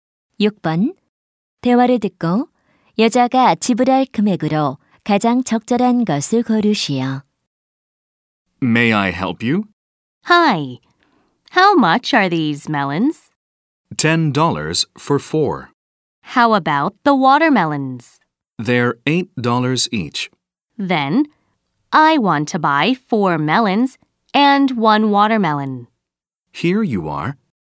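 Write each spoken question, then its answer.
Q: 대화를 듣고 여자가 지불할 금액으로 가장 적절한 것을 고르시오.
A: 18달러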